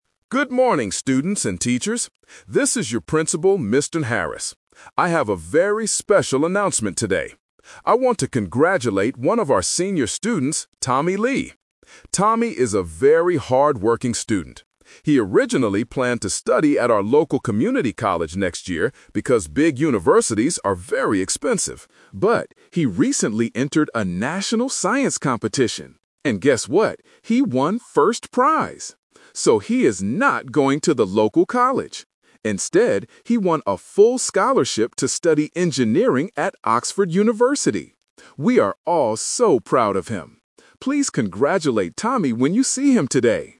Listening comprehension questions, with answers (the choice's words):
Listen to a school principal making an announcement. For each question, choose the correct answer (A, B, or C).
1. Why is the principal making this announcement?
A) To talk about a new local college.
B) To congratulate a student on a big achievement.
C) To invite students to a science competition.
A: To congratulate a student on a big achievement.

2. What did Tommy originally plan to do next year?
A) Study at a local community college.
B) Study at Oxford University.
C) Get a job as an engineer.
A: Study at a local community college.

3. How is Tommy going to pay for Oxford University?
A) His parents will pay for it.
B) He has a full scholarship.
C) He will work at the university.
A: He has a full scholarship.

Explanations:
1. The principal says, "I want to congratulate one of our senior students, Tommy Lee" (Option B - Key). Option A is a trap because he mentions a "local community college," but that is not the main purpose of the announcement. Option C is a trap because he talks about a "science competition" that Tommy entered, not an invitation for others.
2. The principal explicitly states that Tommy "originally planned to study at our local community college next year" (Option A - Key). Option B is a trap because studying at Oxford is what he is actually going to do now. Option C is a trap combining "Engineering" with a job, but Tommy is going to study it, not work yet.
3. The principal says Tommy "won a full scholarship to study Engineering at Oxford University" (Option B - Key). Option A is a trap because the audio mentions that "big universities are very expensive", which implies his parents couldn't easily pay for it. Option C is not mentioned.

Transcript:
Principal: Good morning, students and teachers. This is your Principal, Mr. Harris. I have a very special announcement today. I want to congratulate one of our senior students, Tommy Lee. Tommy is a very hardworking student. He originally planned to study at our local community college next year because big universities are very expensive. But, he recently entered a national science competition. And guess what? He won first prize! So, he is not going to the local college. Instead, he won a full scholarship to study Engineering at Oxford University. We are all so proud of him. Please congratulate Tommy when you see him today.